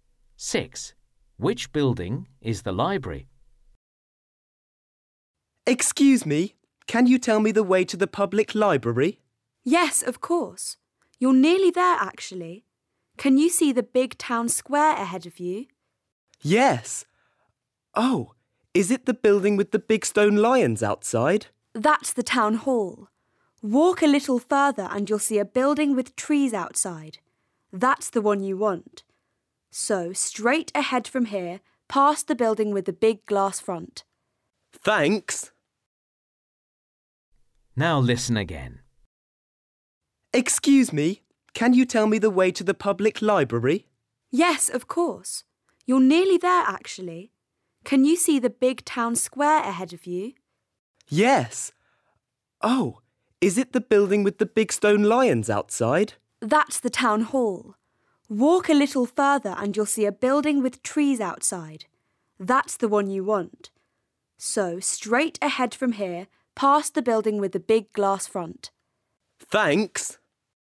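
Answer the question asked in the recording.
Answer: The building with trees outside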